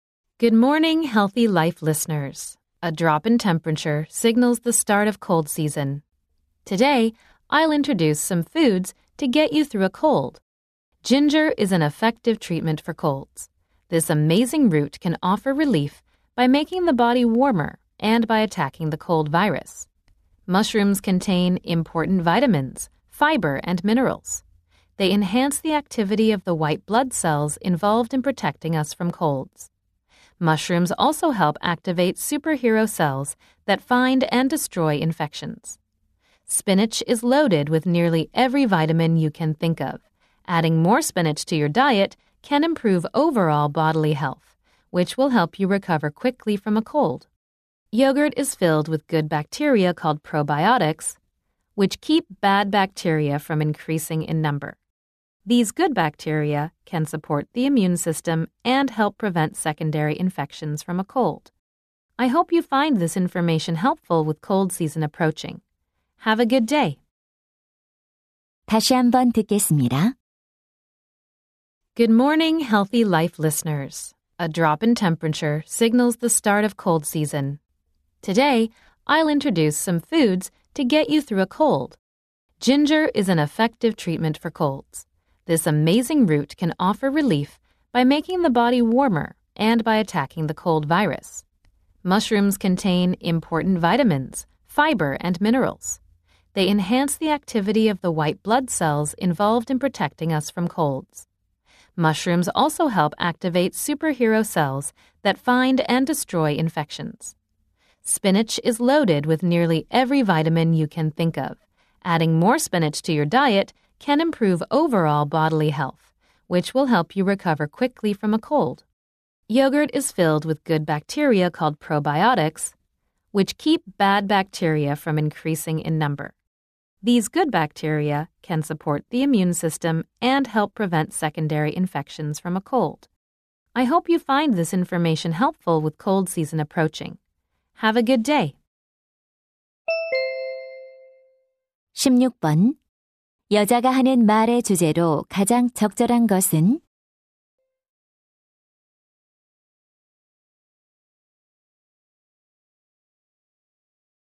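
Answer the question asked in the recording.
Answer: 감기 극복에 도움이 되는 음식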